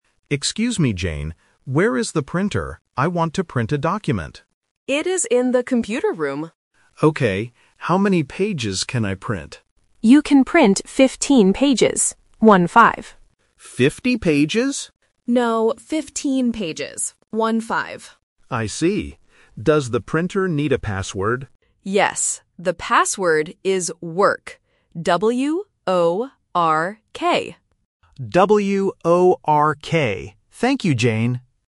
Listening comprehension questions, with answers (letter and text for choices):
Listen to the conversation and choose the correct answer (A, B, or C).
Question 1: Where is the printer?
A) In the meeting room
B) In the computer room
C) In the staff room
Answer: B) In the computer room

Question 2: How many pages can the man print?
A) 15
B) 50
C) 55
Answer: A) 15

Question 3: What is the password for the printer?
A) W-A-L-K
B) W-A-R-K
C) W-O-R-K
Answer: C) W-O-R-K

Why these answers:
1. The correct answer is B. Jane explicitly says, "It is in the computer room." Options A and C are plausible rooms in an office, but they are not mentioned in the dialogue.
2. The correct answer is 15. Jane says he can print "15 pages. One-five". Option B (50) is the trap because Paul mishears and asks "50 pages?", and the numbers "fifteen" and "fifty" sound very similar. Option C is just a wrong number.
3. The correct answer is C. Jane clearly spells the password: "W-O-R-K". Option A (W-A-L-K) is a trap because "walk" and "work" are often confused in pronunciation by beginners. Option B (W-A-R-K) is a trap because the letter "O" can sometimes be misheard as "A".

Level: A1